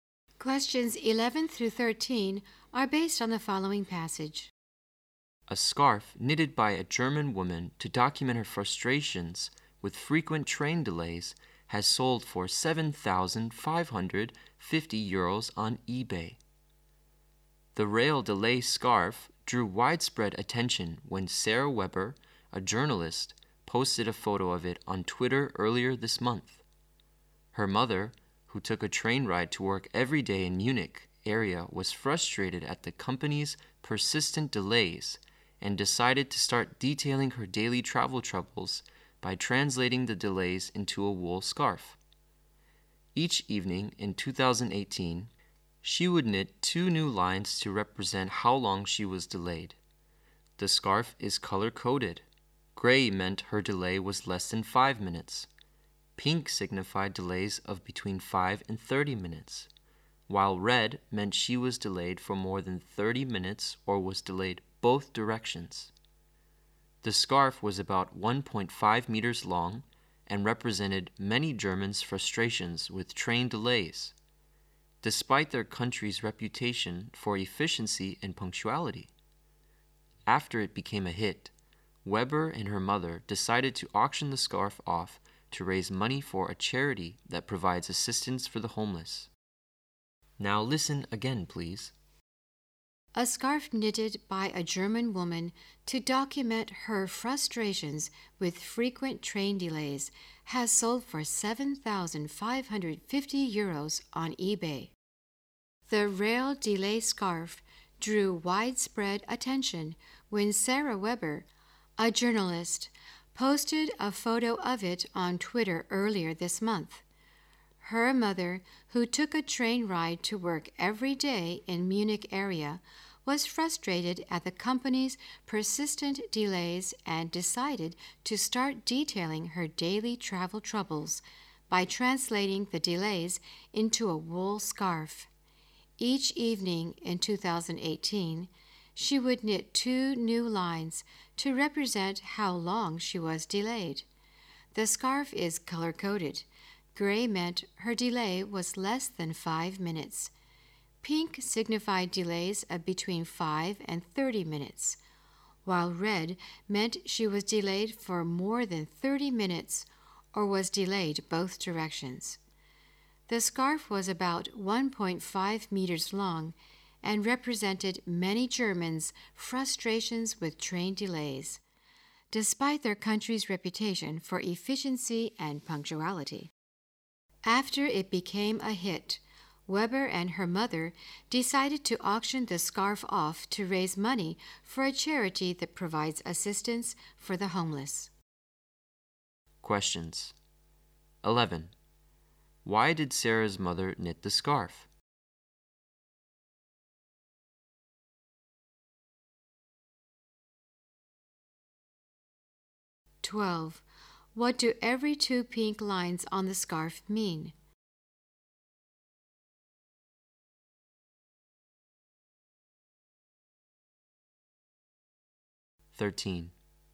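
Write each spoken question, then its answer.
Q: Why did Sarah's mother knit the scarf?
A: To record her frustration with frequent train delays

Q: What do every two pink lines on the scarf mean?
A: A day's delays of between 5 and 30 minutes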